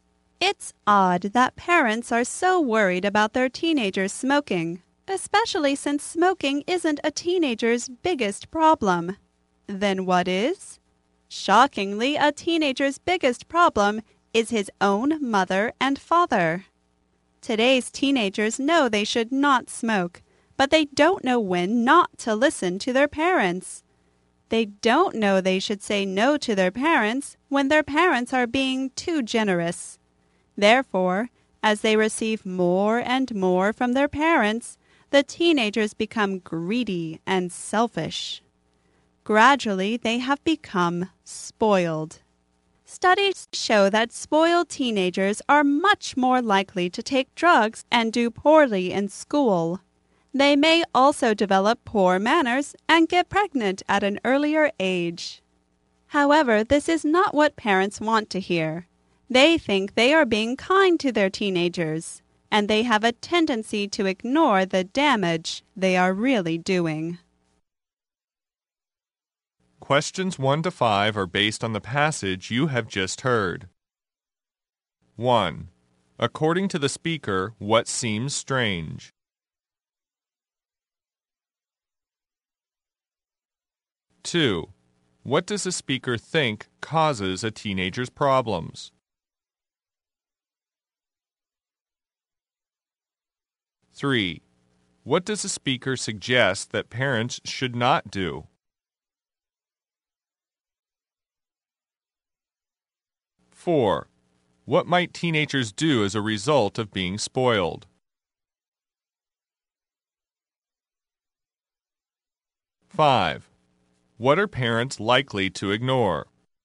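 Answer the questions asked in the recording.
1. Parents worry so much about teenagers smoking
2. His own parents
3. Be too generous to their teenagers
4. Take drugs, do poorly in school
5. The damage they are really doing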